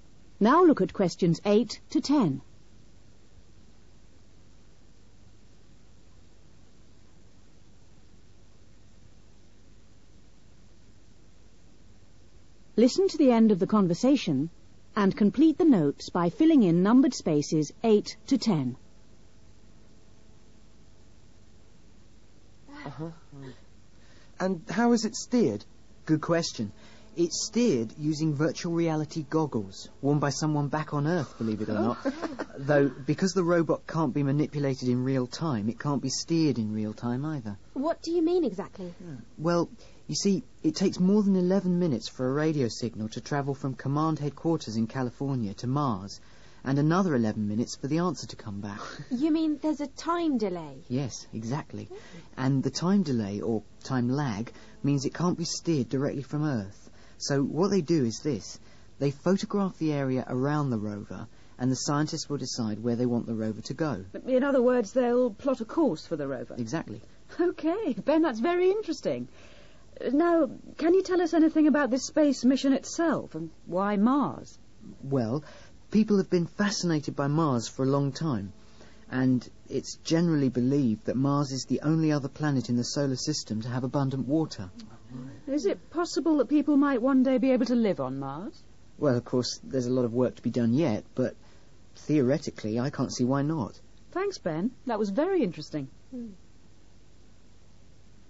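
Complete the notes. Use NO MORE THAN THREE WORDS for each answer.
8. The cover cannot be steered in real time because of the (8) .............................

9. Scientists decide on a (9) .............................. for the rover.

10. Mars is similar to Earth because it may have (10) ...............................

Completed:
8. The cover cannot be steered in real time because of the time delay
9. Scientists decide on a course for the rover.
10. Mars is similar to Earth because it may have abundant water

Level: B1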